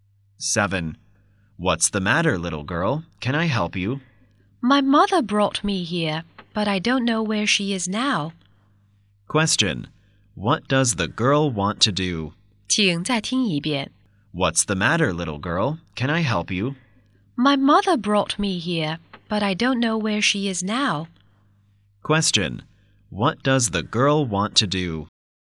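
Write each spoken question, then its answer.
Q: Question. What does the girl want to do?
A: To find her mother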